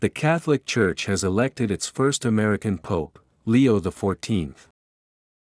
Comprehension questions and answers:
The Catholic Church ( ), Leo the Fourteenth.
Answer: has elected its first American pope

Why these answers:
弱音の機能語のリスニングはやや難易度が高いです。「elected its」とリンキングしている箇所に注意してください。

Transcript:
The Catholic Church has elected its first American pope, Leo the Fourteenth.